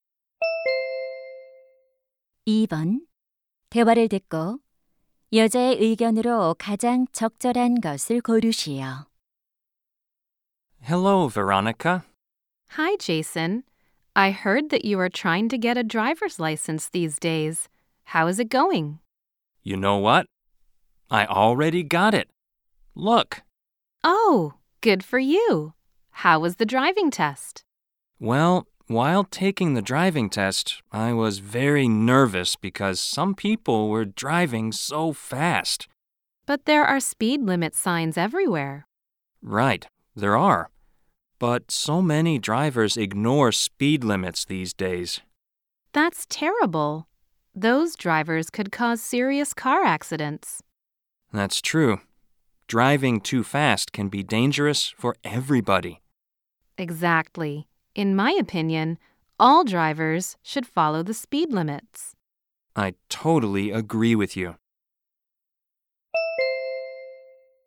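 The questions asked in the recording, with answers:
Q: 대화를 듣고 여자의 의견으로 가장 적절한 것을 고르시오.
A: 모든 운전자는 제한 속도를 지켜야 한다.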